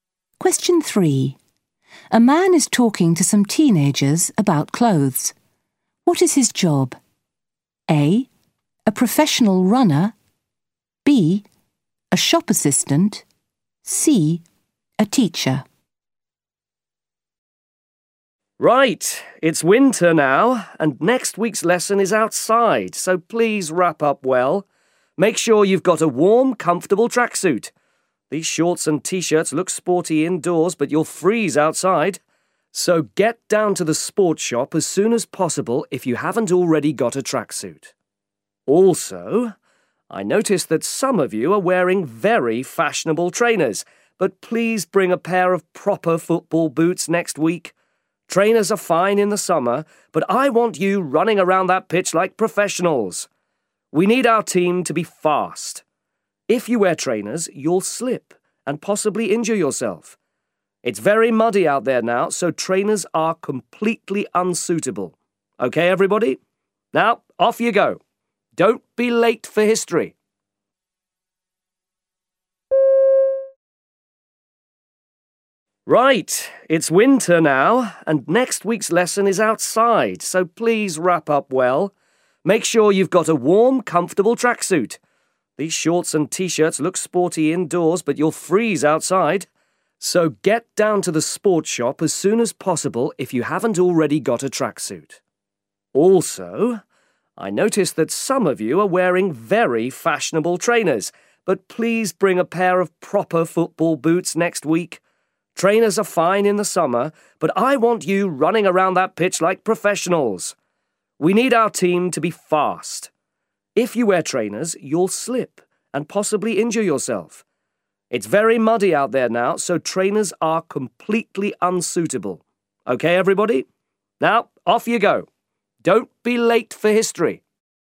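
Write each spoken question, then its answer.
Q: What is his job?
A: C: A teacher.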